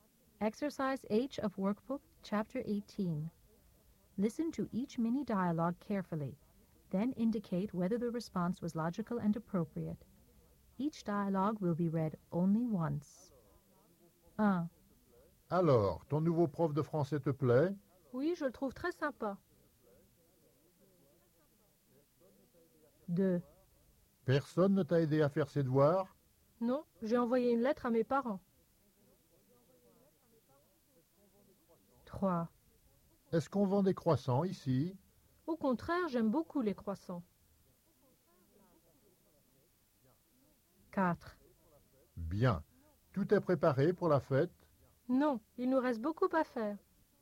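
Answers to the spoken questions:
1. logique
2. illogique
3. illogique
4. logique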